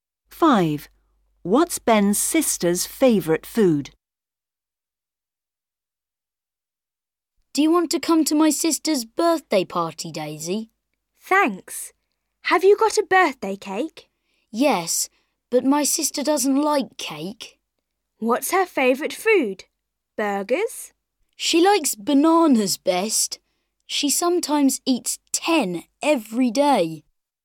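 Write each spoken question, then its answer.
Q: What's Ben's sister's favourite food?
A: bananas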